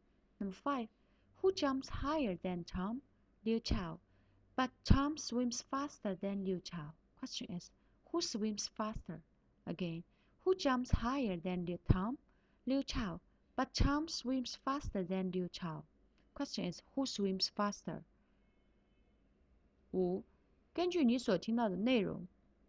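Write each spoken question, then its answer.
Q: who swims faster?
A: Tom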